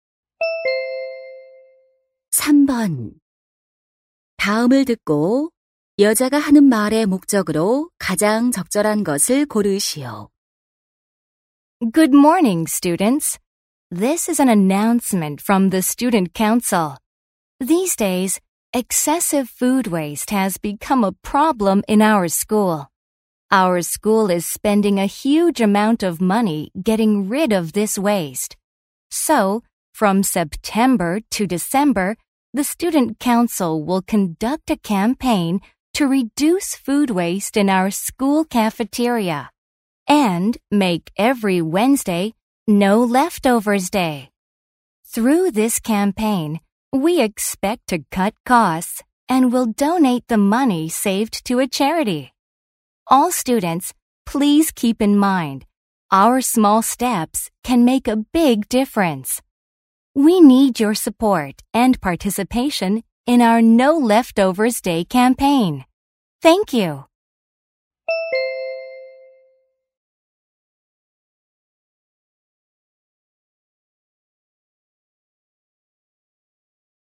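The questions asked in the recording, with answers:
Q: 다음을 듣고 여자가 하는 말의 목적으로 가장 적절한 것을 고르시오.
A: 음식물 쓰레기 줄이기 캠페인(No Leftovers Day) 참여를 독려하려고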